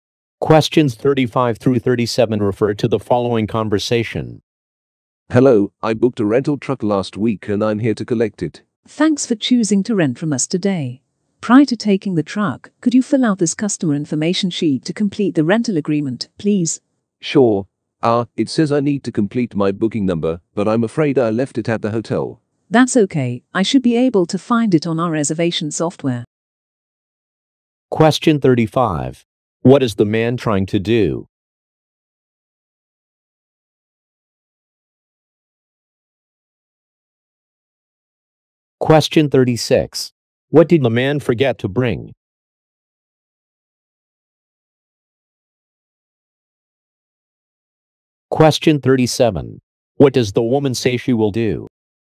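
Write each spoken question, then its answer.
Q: What is the man trying to do?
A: Pick up a rental truck

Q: What did the man forget to bring?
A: His booking number

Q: What does the woman say she will do?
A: Find the booking number in the reservation software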